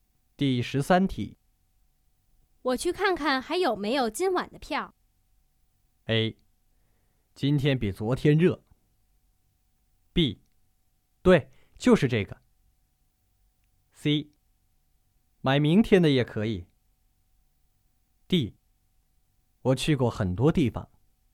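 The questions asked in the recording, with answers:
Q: 我去看看还有没有今晚的票。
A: C: 买明天的也可以。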